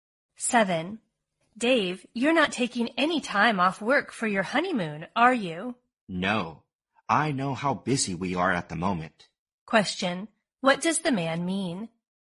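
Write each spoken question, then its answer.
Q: What does the man mean?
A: He won't take time off work for his honeymoon because they are busy.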